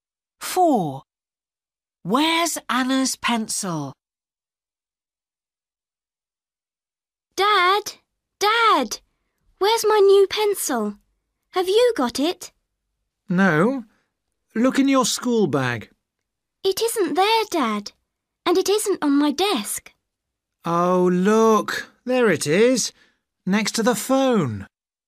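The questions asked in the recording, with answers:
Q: Where's Anna's pencil?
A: next to the phone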